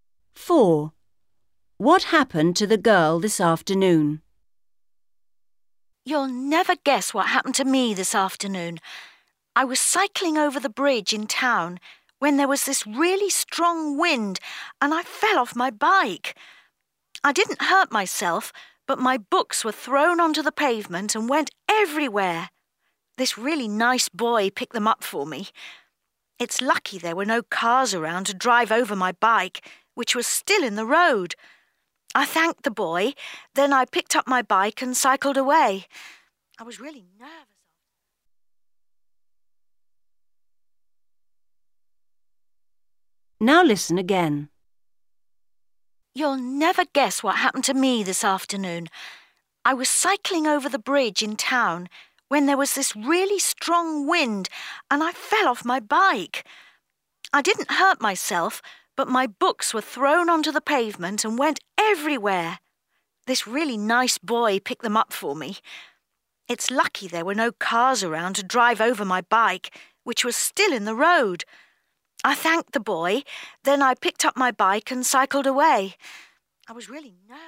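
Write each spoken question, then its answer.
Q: What happened to the girl this afternoon?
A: she fell off her bike in the wind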